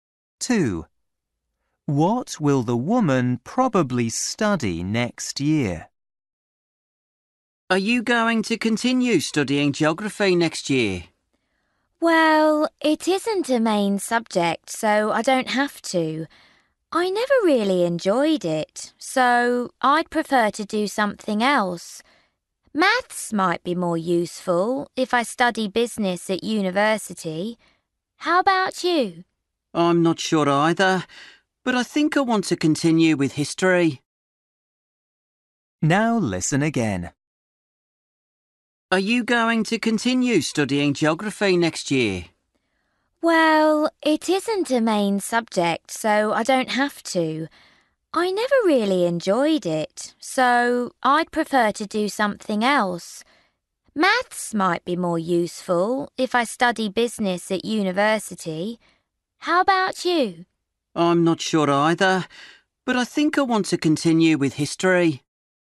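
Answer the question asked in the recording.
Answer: Maths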